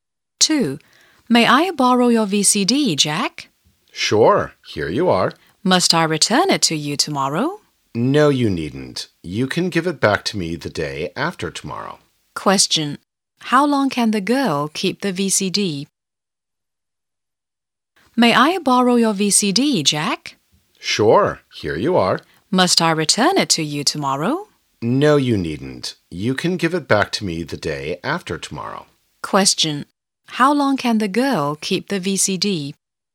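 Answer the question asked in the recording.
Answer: Two days (until the day after tomorrow)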